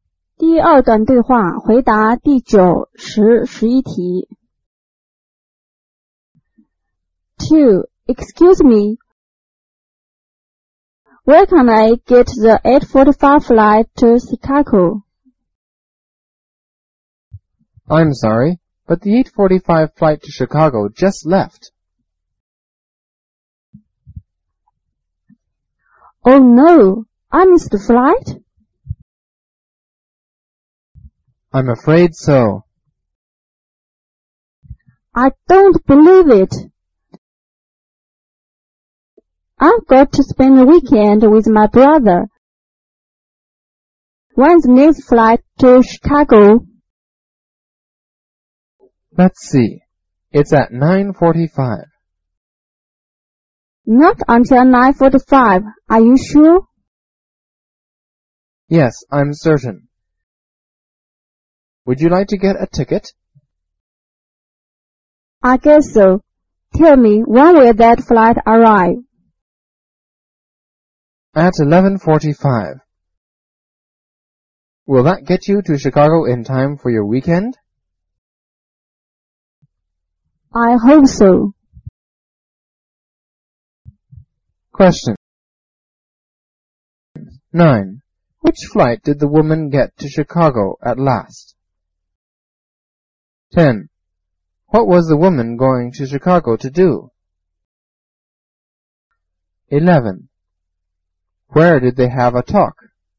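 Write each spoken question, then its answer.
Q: Which flight did the woman get to Chicago at last?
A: The 9:45 flight

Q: What was the woman going to Chicago to do?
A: To spend the weekend with her brother

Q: Where did they have a talk?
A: At the airport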